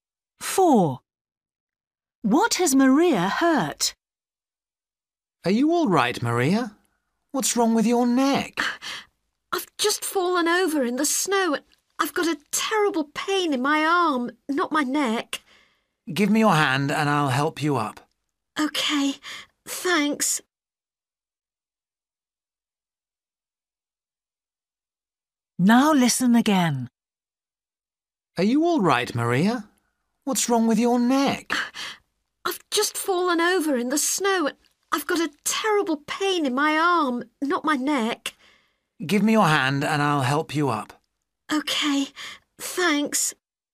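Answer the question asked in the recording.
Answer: Her arm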